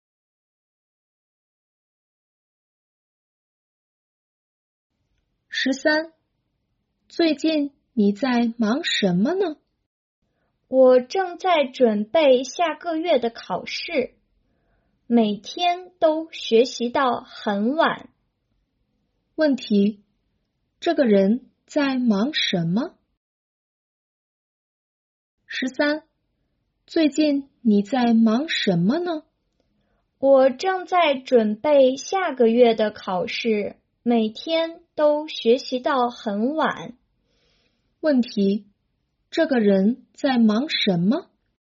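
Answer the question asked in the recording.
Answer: 准备下个月的考试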